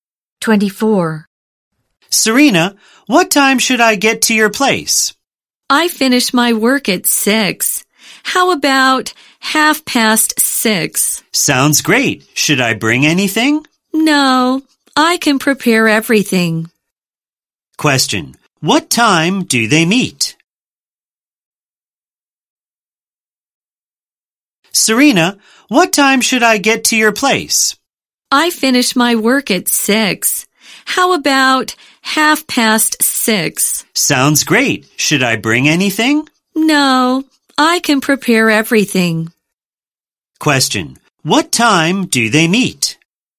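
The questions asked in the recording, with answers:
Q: Question, what time do they meet?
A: At 6:30.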